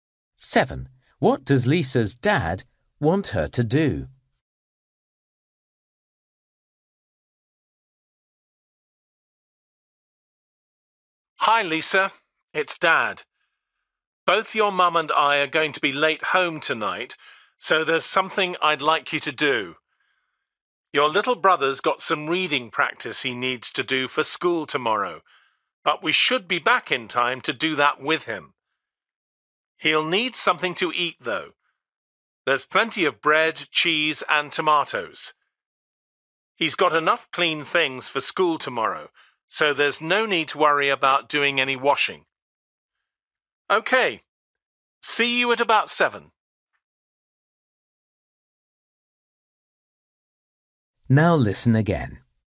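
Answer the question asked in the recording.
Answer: Make her little brother something to eat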